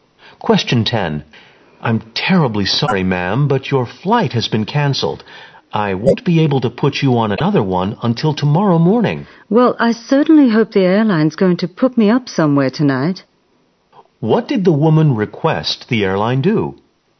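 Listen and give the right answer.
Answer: Provide her a place to stay tonight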